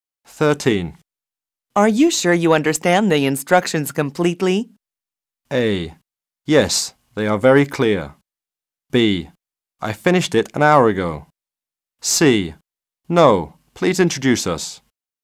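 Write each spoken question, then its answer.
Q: Are you sure you understand the instructions completely?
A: A: Yes, they are very clear.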